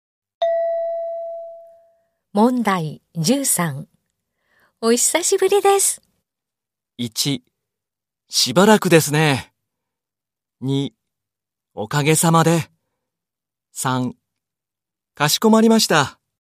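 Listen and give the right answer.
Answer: 1: しばらくですね。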